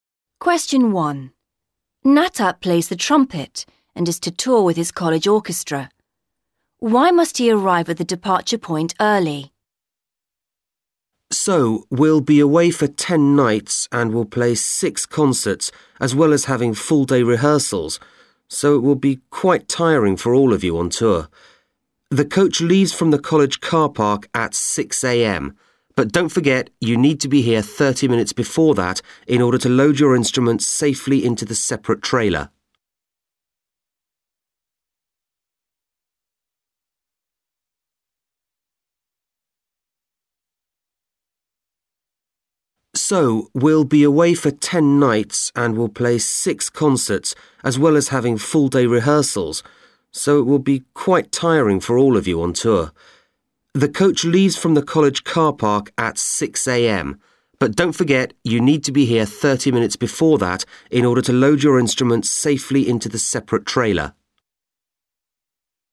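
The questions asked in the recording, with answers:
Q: Why must he arrive at the departure point early?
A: To load the instruments safely into the separate trailer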